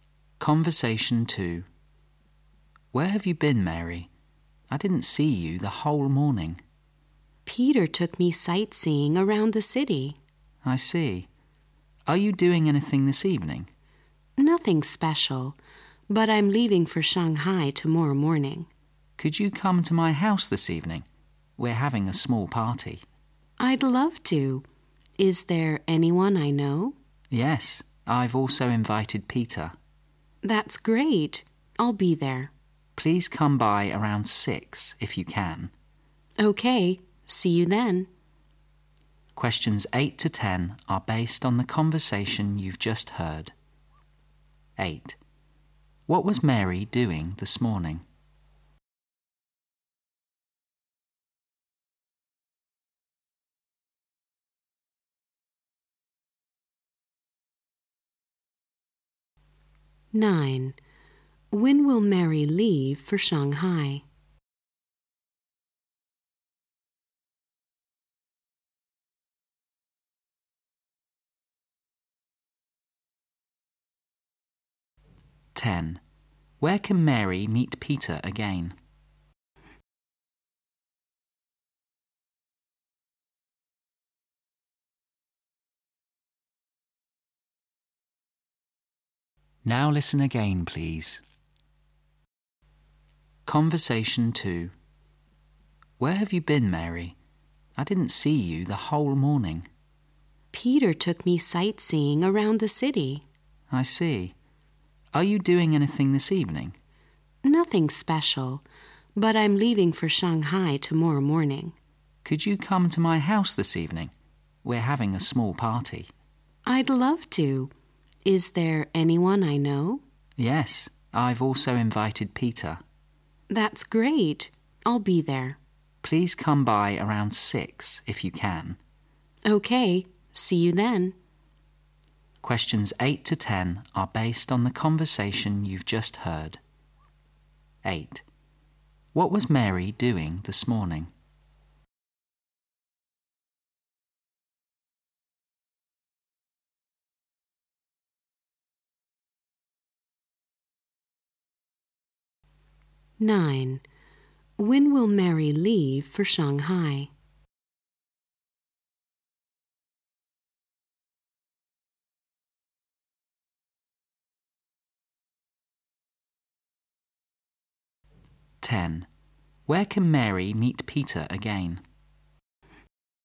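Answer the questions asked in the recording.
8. Sightseeing around the city with Peter.
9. Tomorrow morning.
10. At the man's house party this evening.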